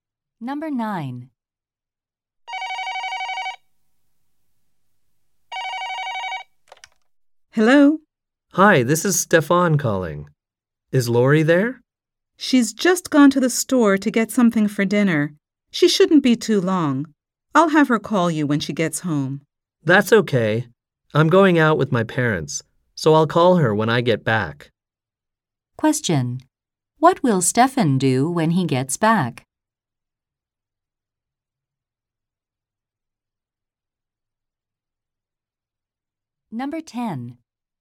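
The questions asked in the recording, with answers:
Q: What will Stefan do when he gets back?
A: Call Lori.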